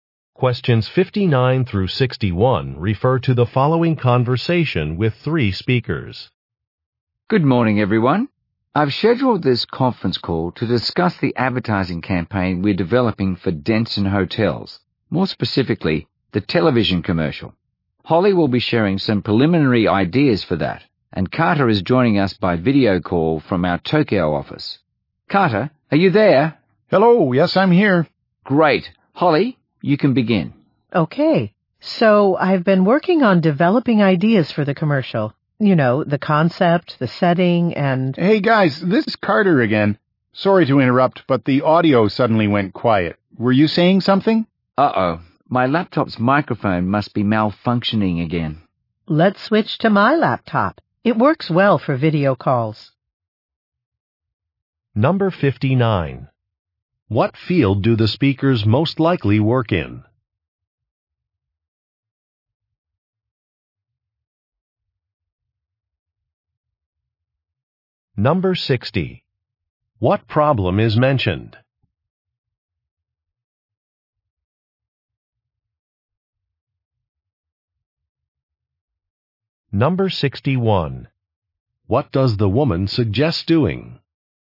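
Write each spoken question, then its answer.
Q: What field do the speakers most likely work in?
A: Advertising

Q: What problem is mentioned?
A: A laptop microphone is malfunctioning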